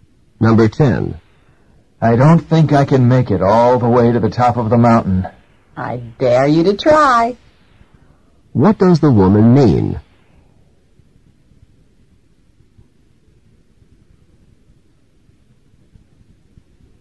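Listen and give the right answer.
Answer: She is challenging him to try to reach the top.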